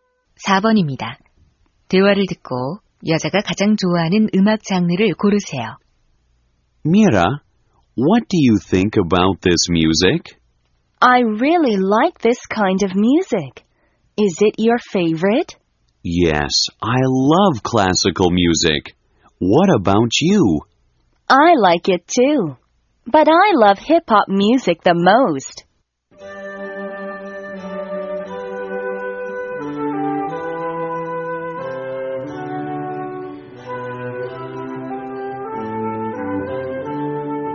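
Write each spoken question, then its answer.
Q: 대화를 듣고 여자가 가장 좋아하는 음악 장르를 고르세요.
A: 클래식 음악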